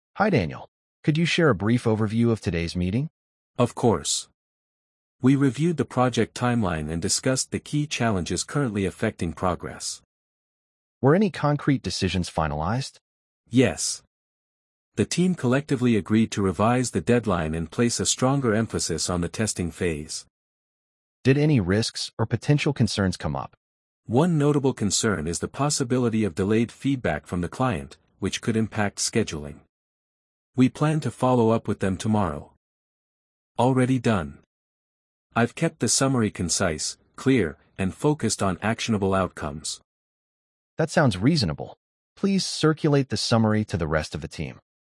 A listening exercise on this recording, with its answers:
Complete the phrases as you listen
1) Hi Daniel, could you share a brief ______ of today's meeting?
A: overview

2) We reviewed the project timeline and discussed the key ______.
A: challenges

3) Were any concrete ______ finalized?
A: decisions

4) The team collectively ______ to revise the deadline.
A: agreed

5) Place a stronger ______ on the testing phase.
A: emphasis

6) Did any risks or potential ______ come up?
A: concerns